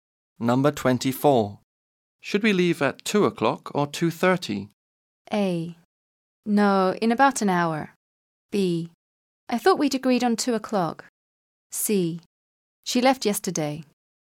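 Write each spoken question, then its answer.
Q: Should we leave at 2 o'clock or 2:30?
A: B: I thought we'd agreed on 2 o'clock.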